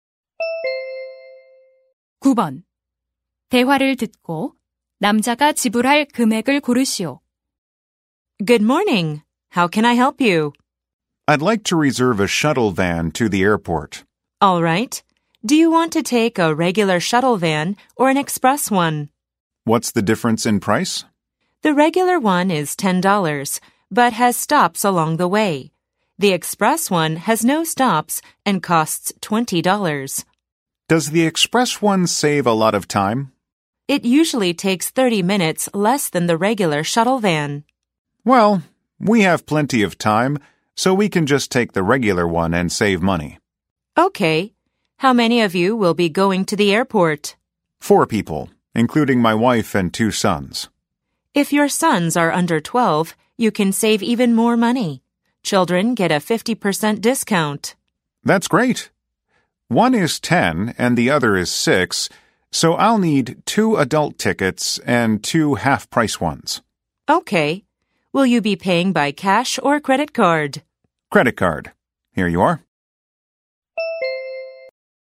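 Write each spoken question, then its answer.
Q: 대화를 듣고 남자가 지불할 금액을 고르시오.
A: $30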